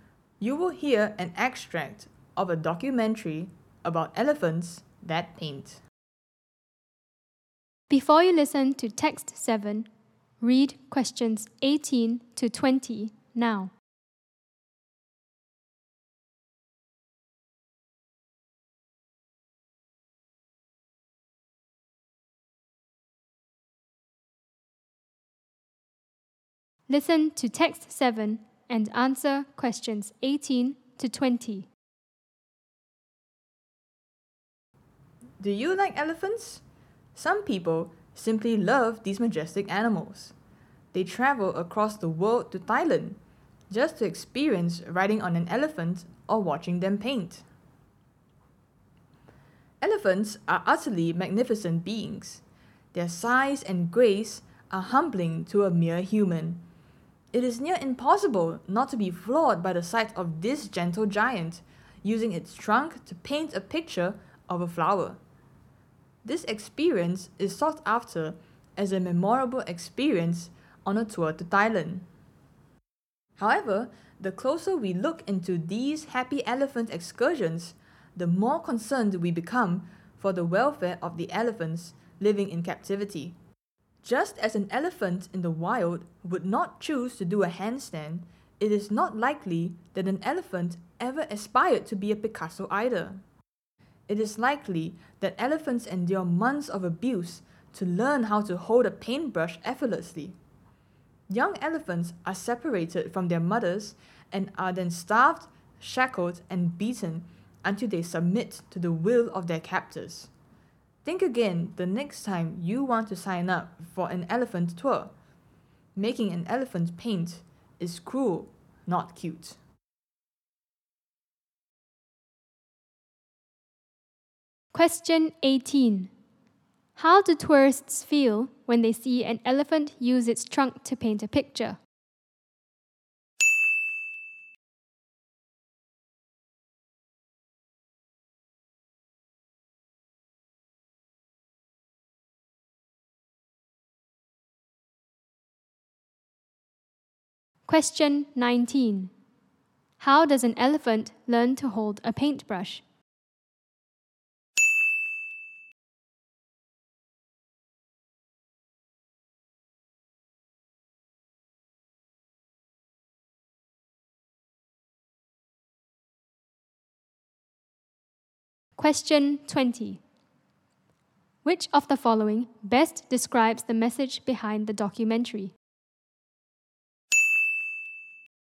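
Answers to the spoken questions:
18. Amazed (floored)
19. Through months of abuse
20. Making an elephant paint is cruel, not cute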